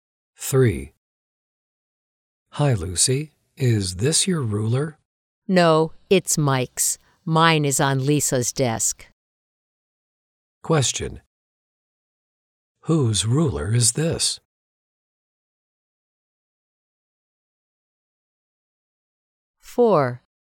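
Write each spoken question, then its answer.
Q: Whose ruler is this?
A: Mike's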